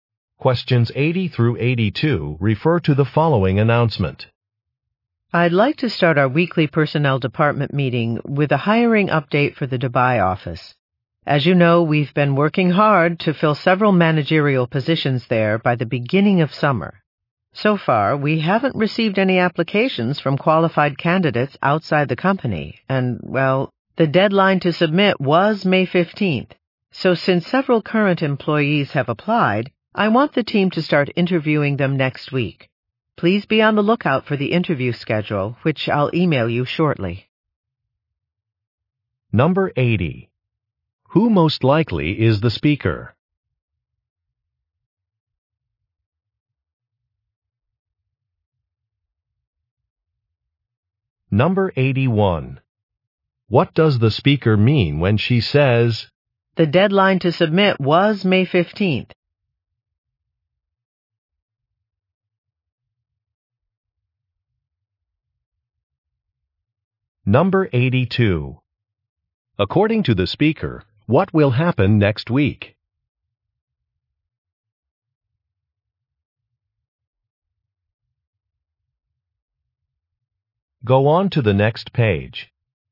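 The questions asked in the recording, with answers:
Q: Who most likely is the speaker?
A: A personnel (HR) department manager

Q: According to the speaker, what will happen next week?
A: The team will start interviewing current employees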